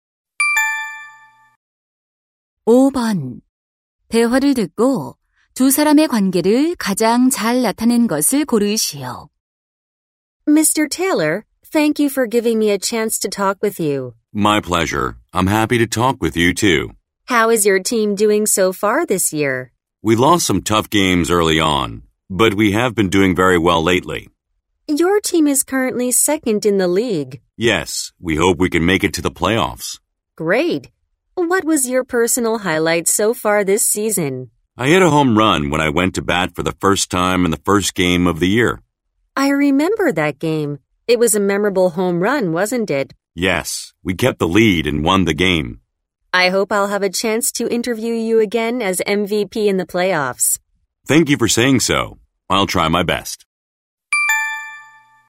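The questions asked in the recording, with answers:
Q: 대화를 듣고 두 사람의 관계를 가장 잘 나타낸 것을 고르시오.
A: 기자 - 야구 선수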